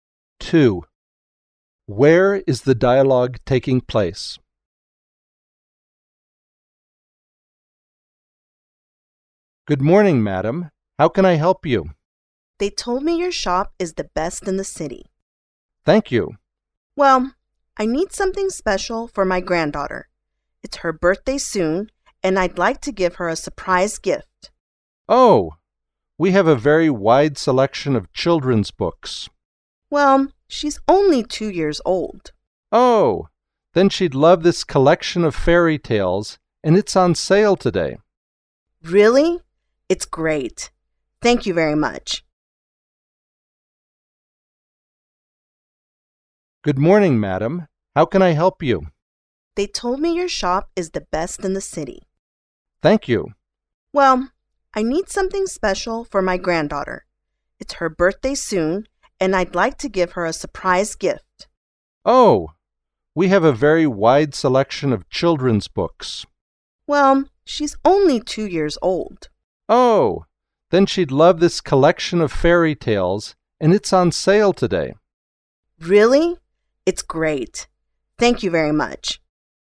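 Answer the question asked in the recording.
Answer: In a bookshop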